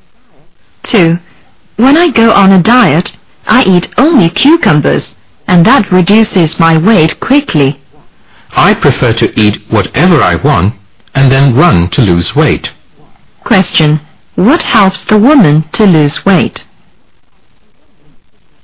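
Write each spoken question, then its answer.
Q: What helps the woman to lose weight?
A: Running (exercise)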